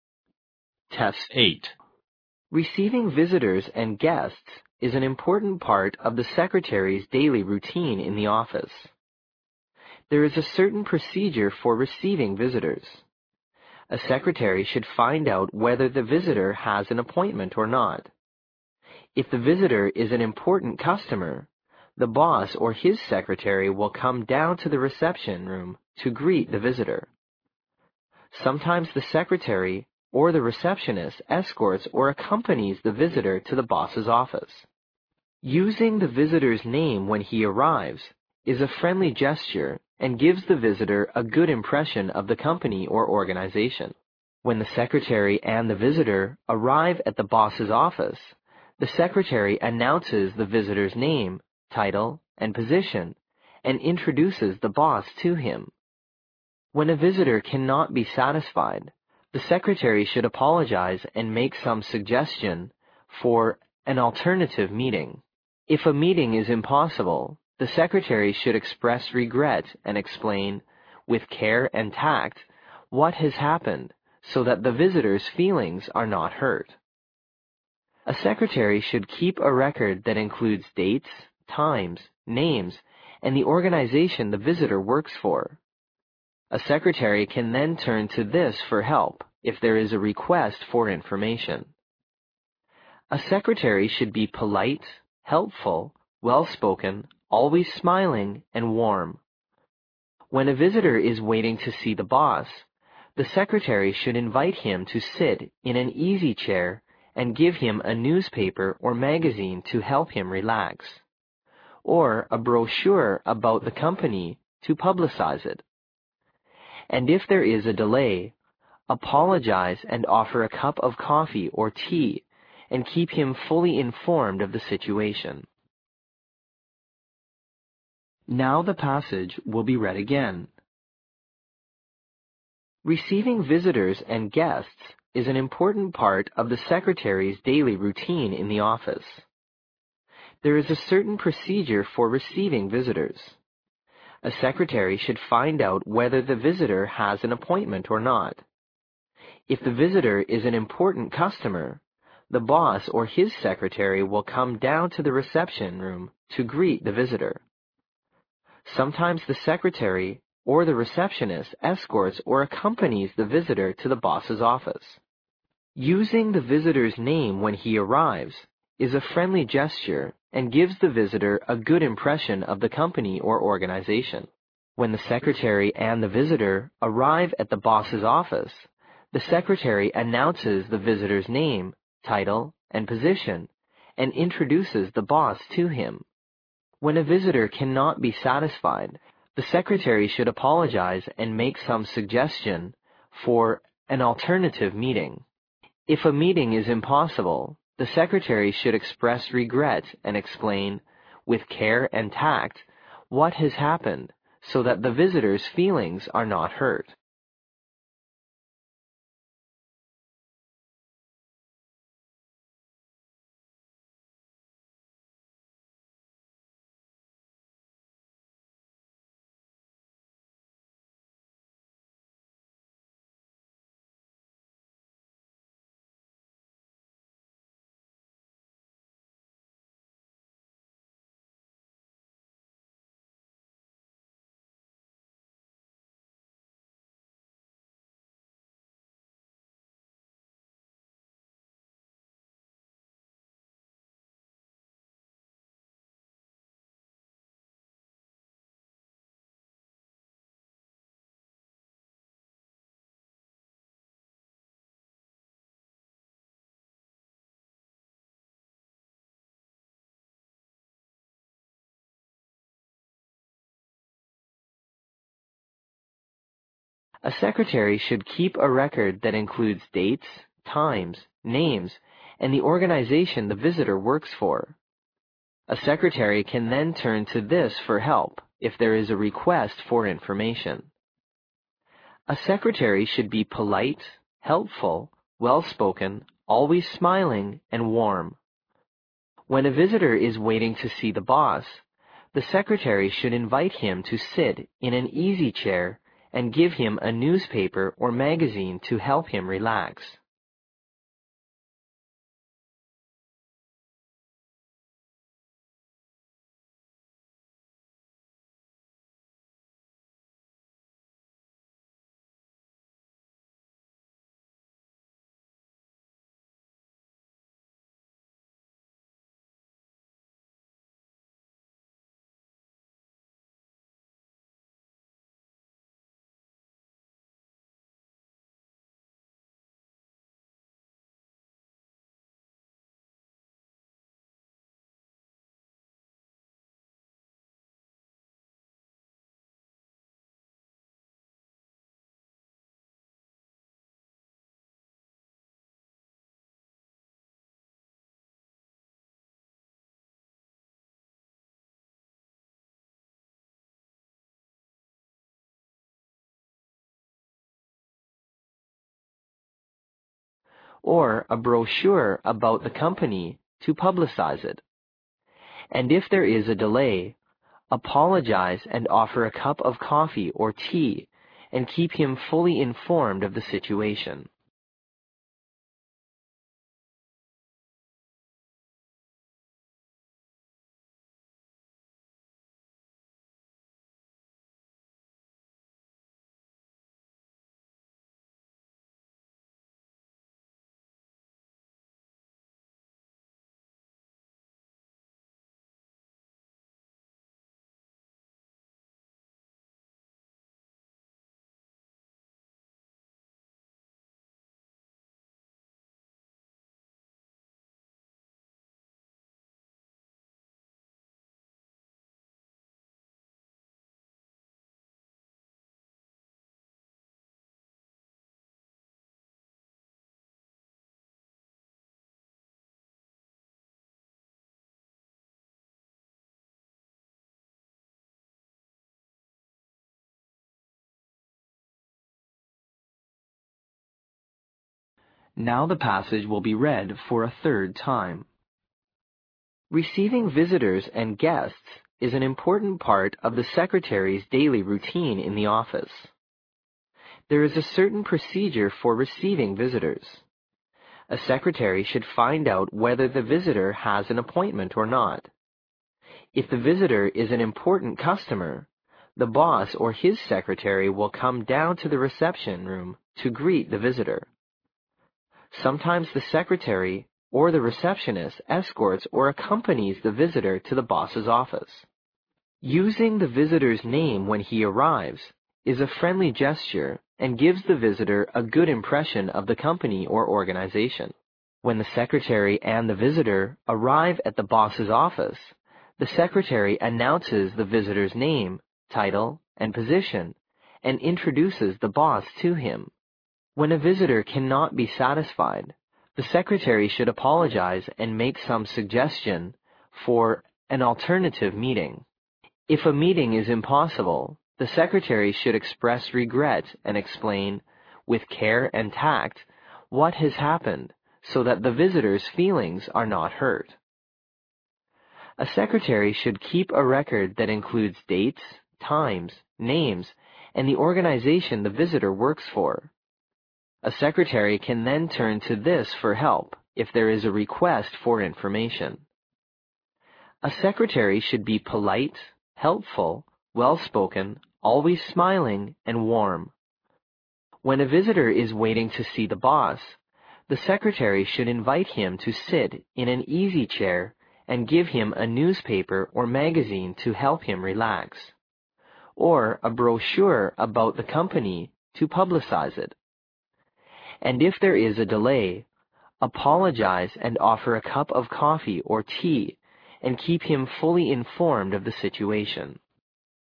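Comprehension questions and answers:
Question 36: There is a certain (36) ______ for receiving visitors.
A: procedure

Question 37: If the visitor is an important (37) ______ , the boss or his secretary will come down to the reception room to (38) ______ the visitor.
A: customer

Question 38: If the visitor is an important (37) ______ , the boss or his secretary will come down to the reception room to (38) ______ the visitor.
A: greet

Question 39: Sometimes the secretary or the receptionist escorts or (39) ______ the visitor to the boss's office.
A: accompanies

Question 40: (40) ______ the visitor's name when he arrives is a friendly gesture and gives the visitor a good impression of the company or organization.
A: Using

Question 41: When the secretary and the visitor arrive at the boss's office, the secretary (41) ______ the visitor's name, title and position, and introduces the boss to him.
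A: announces

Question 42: When a visitor cannot be (42) ______ , the secretary should apologize and make some suggestion for an (43) ______ meeting.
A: satisfied

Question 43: When a visitor cannot be (42) ______ , the secretary should apologize and make some suggestion for an (43) ______ meeting.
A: alternative

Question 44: If a meeting is impossible, (44) ____________________________________________________________________________________ .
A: the secretary should express regret and explain, with care and tact, what has happened so that the visitor's feelings are not hurt

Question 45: When a visitor is waiting to see the boss, (45) _____________________________________________________________________________ , or a brochure about the company to publicize it.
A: the secretary should invite him to sit in an easy chair and give him a newspaper or magazine to help him relax

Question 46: (46) ______________________________________________________________________ .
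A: And if there is a delay, apologize and offer a cup of coffee or tea and keep him fully informed of the situation

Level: 六级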